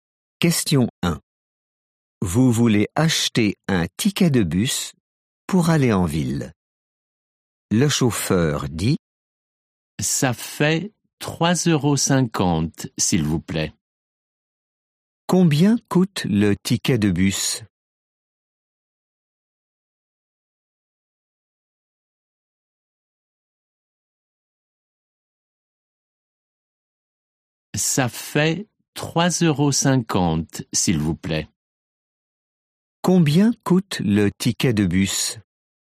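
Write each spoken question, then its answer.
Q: Combien coûte le ticket de bus ?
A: 3,50 €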